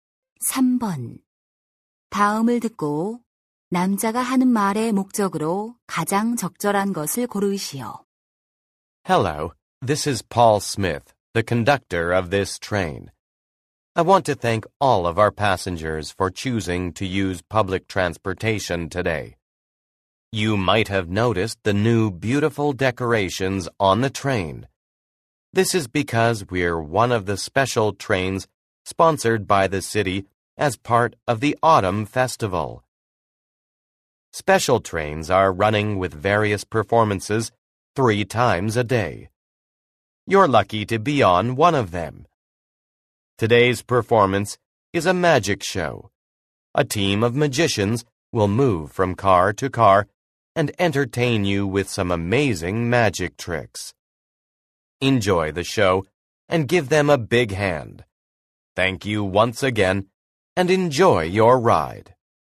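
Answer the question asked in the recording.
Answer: 기차 안에서 열리는 마술 공연을 안내하려고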